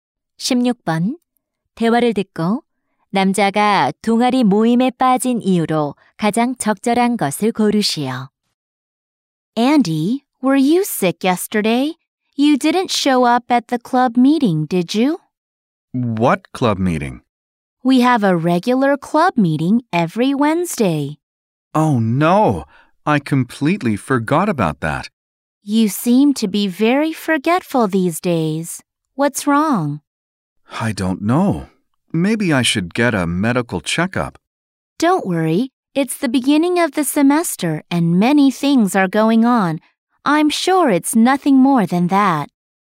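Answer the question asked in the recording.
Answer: 모임을 완전히 잊어버려서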